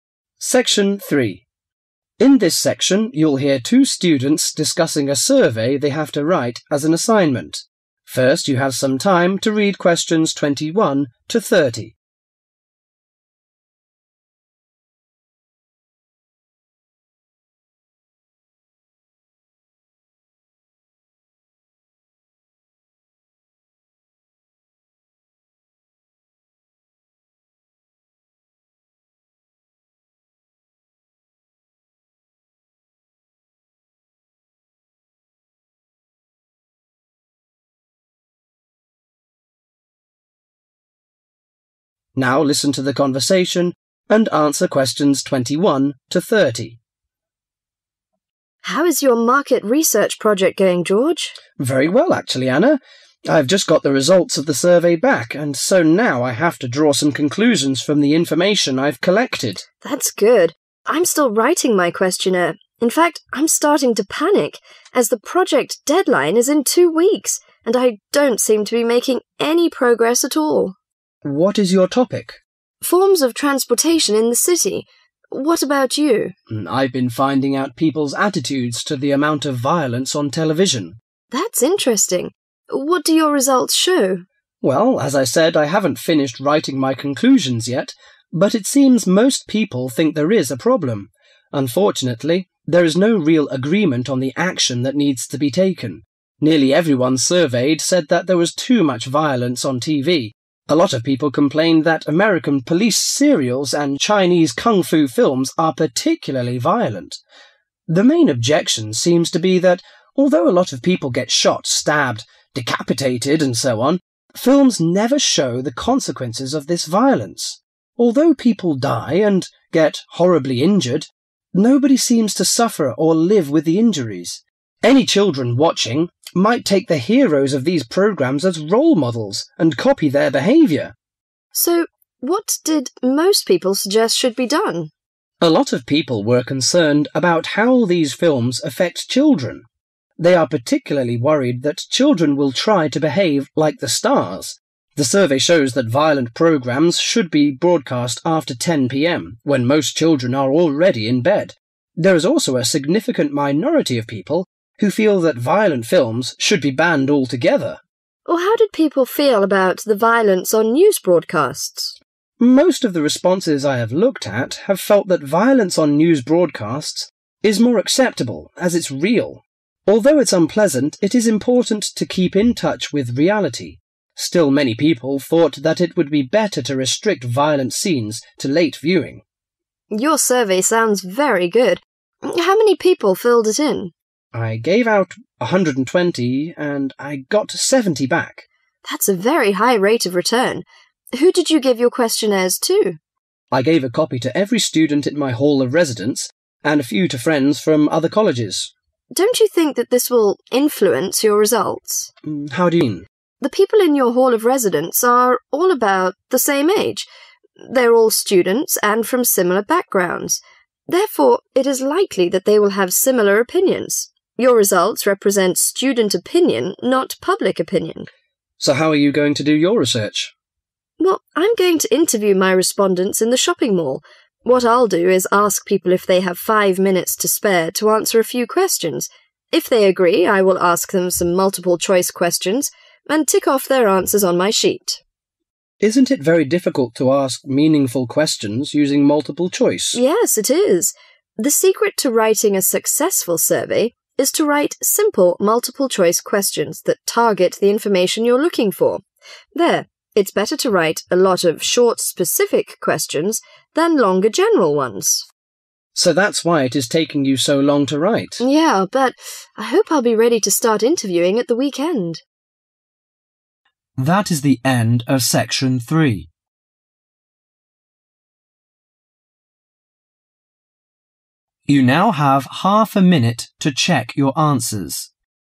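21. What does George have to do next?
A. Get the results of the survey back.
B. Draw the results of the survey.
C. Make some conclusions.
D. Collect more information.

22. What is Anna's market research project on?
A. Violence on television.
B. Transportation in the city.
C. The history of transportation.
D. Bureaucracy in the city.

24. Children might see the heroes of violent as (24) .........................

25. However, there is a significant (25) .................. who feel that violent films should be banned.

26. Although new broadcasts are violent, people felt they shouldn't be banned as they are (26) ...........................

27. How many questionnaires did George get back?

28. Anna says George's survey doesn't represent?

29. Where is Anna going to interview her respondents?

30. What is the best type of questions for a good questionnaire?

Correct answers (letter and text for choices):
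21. C. Make some conclusions.
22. B. Transportation in the city.
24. role models
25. minority
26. real
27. 70
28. public opinion
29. in the shopping mall
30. short, specific questions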